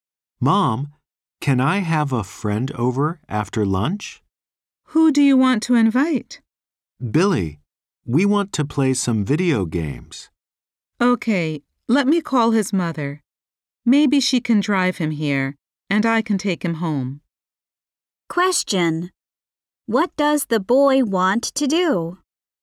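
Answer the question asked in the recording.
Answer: Invite his friend Billy over to play video games after lunch.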